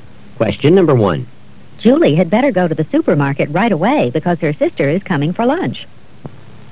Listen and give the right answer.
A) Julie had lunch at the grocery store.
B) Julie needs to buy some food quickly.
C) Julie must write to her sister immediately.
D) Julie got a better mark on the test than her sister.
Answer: B) Julie needs to buy some food quickly.

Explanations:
Julie had better go to the supermarket right away because her sister is coming for lunch.

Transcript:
Julie had better go to the supermarket right away because her sister is coming for lunch.